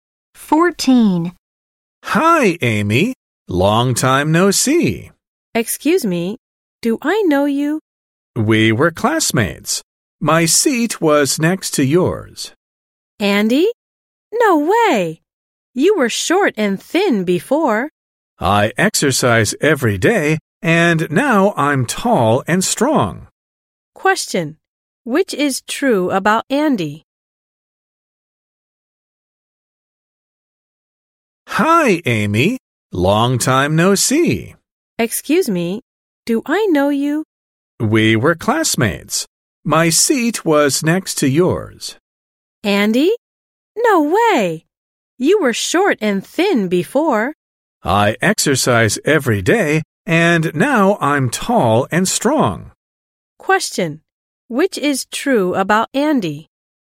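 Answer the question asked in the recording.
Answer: He was short and thin before, but now he is tall and strong because he exercises every day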